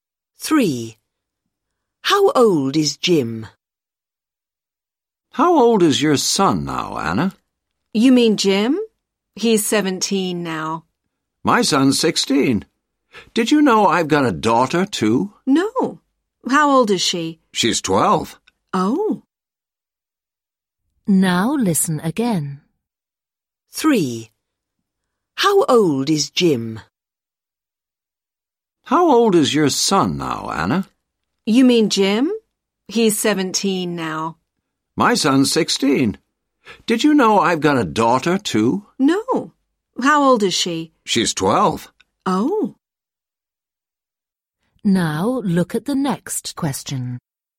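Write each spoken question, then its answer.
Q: How old is Jim?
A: 17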